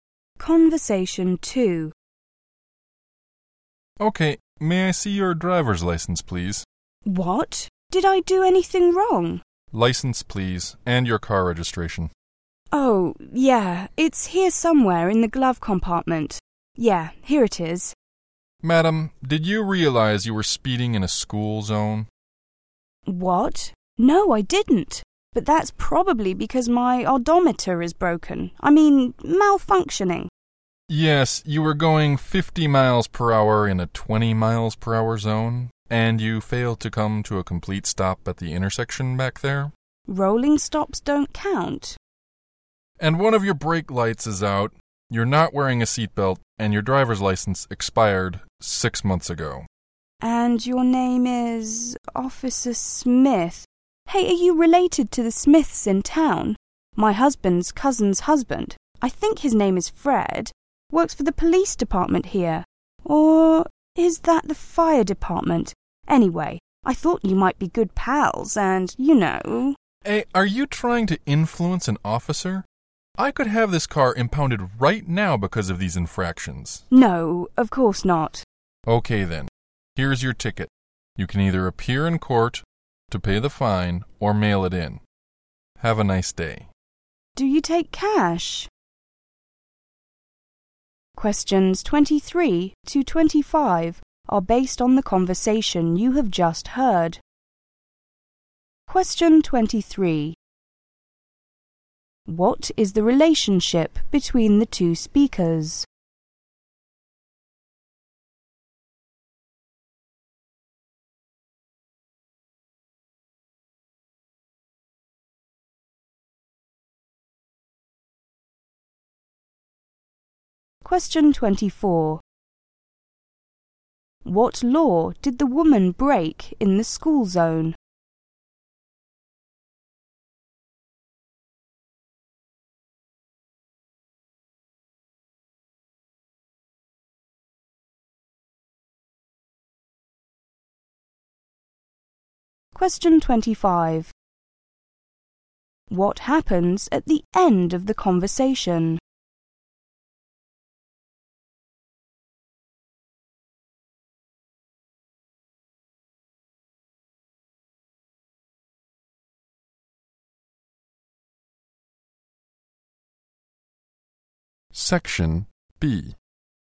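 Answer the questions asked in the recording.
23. Police officer and driver
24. She was speeding
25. The officer gives the woman a ticket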